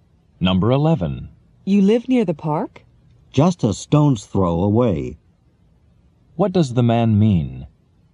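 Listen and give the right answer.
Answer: He lives very close to the park.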